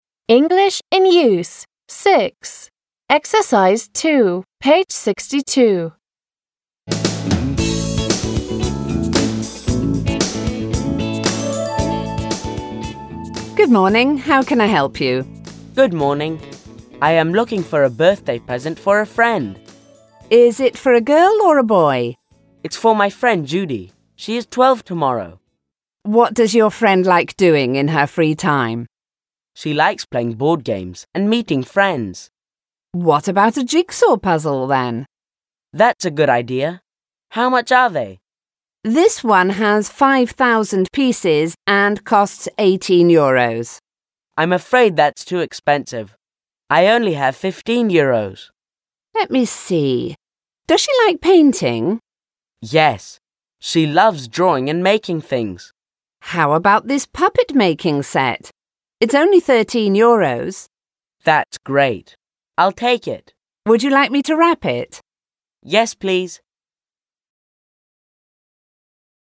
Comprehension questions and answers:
Read the sentences below and decide if they are said by the shop assistant or the customer. What are they talking about? Listen, read and check.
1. How can I help you?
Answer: Shop Assistant

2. I am looking for a birthday present for a friend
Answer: Customer

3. Is it for a girl or a boy?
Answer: Shop Assistant

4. What about a jigsaw puzzle then?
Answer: Shop Assistant

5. How much are they?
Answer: Покупатель

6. I'm afraid that's too expensive.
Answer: Покупатель

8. Would you like me to wrap it?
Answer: Shop Assistant

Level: 6 класс